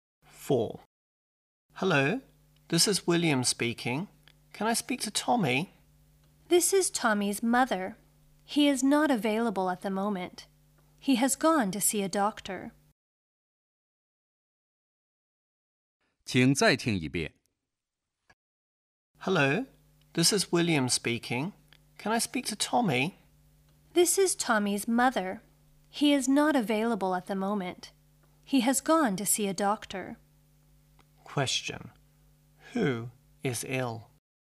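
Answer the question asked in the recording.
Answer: Tommy.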